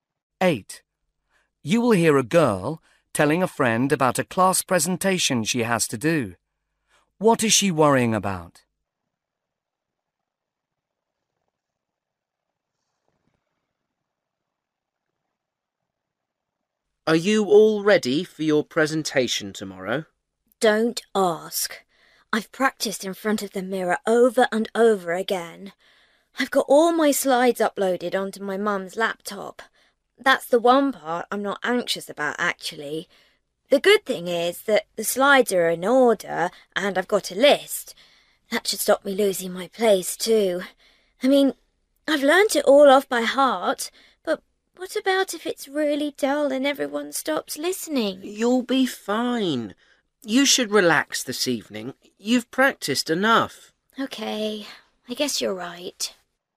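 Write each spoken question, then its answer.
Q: What is she worrying about?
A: That her presentation will be dull and people will stop listening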